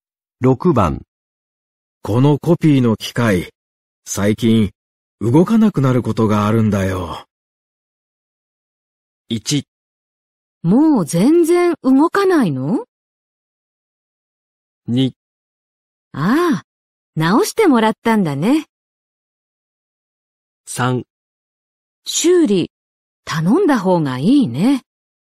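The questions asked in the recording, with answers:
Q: このコピーの機械、最近、動かなくなることがあるんだよ。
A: 3: 修理、頼んだ方がいいね。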